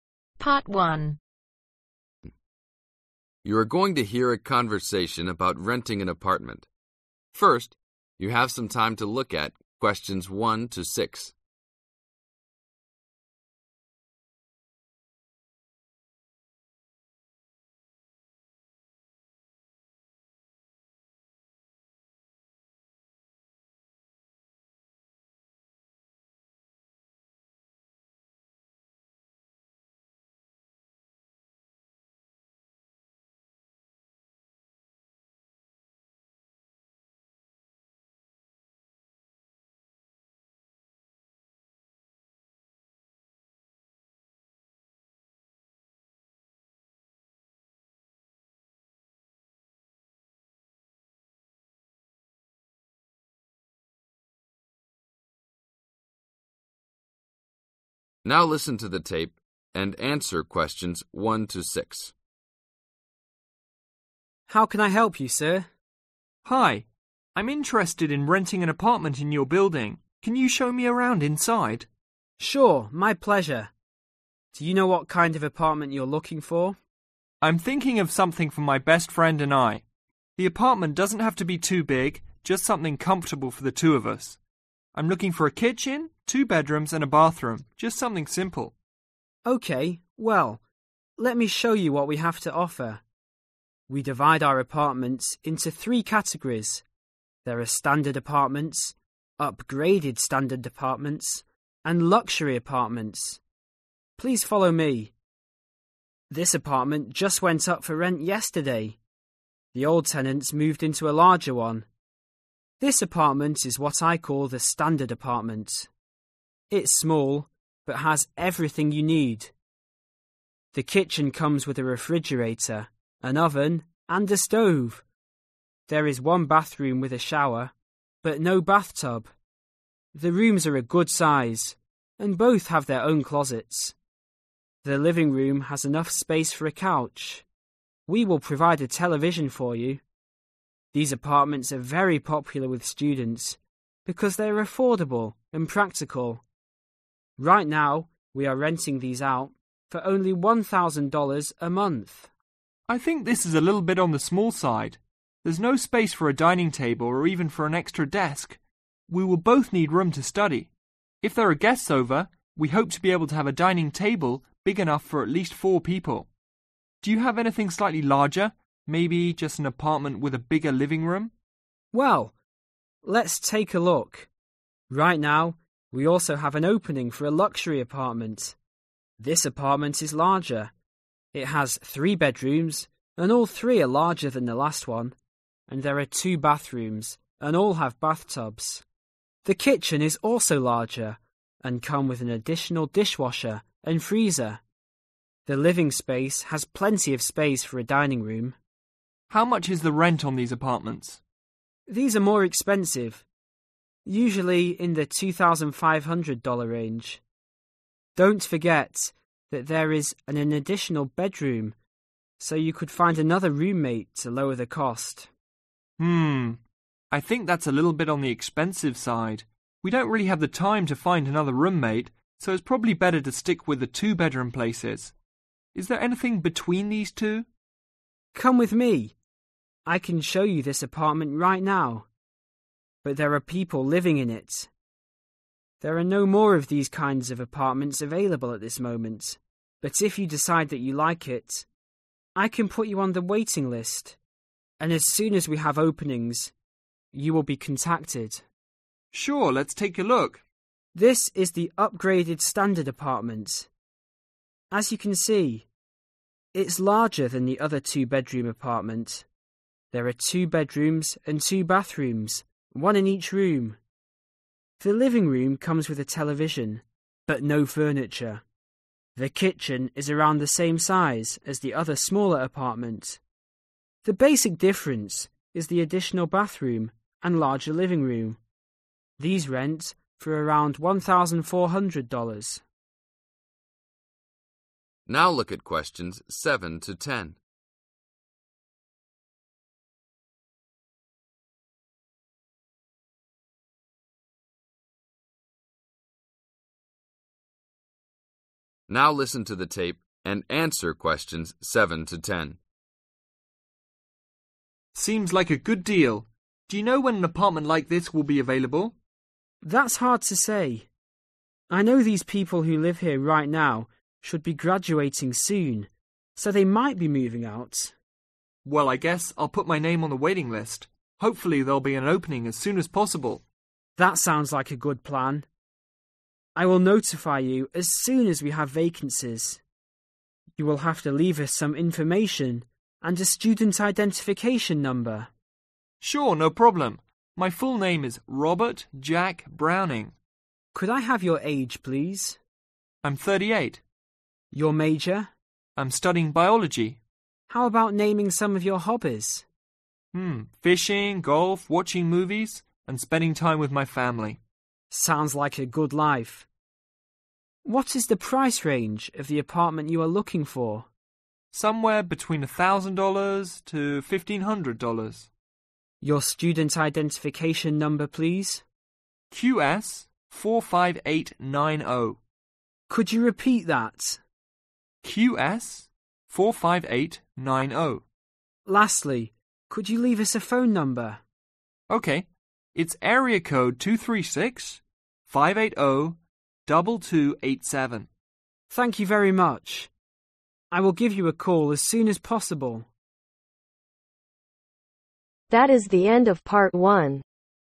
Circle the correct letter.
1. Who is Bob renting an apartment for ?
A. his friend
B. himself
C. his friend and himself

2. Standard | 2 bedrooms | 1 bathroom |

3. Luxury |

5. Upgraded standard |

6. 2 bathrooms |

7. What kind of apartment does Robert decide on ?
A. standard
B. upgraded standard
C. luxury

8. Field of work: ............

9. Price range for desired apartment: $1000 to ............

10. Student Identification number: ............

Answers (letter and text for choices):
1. C. his friend and himself
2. $1000
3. 3
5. 2
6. $1400
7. B. upgraded standard
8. biology
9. $1500
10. QS45890